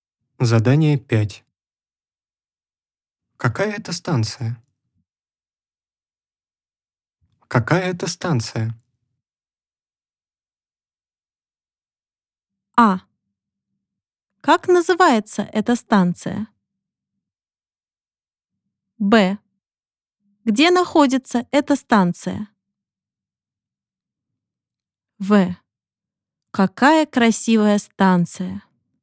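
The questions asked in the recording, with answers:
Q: Какая это станция?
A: А: Как называется эта станция?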